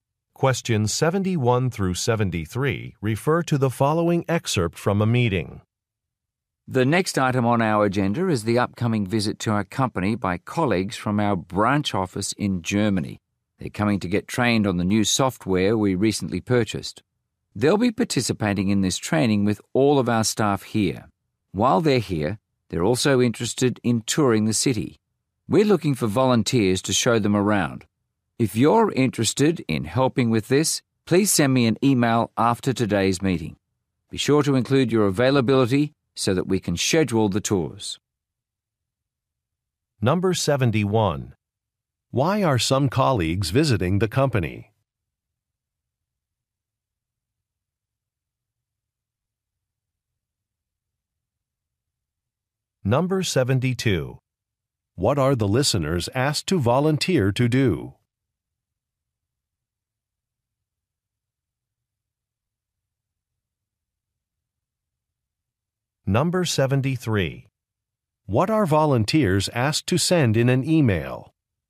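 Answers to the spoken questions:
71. To get trained on the new software
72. Show the visitors around the city
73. Their availability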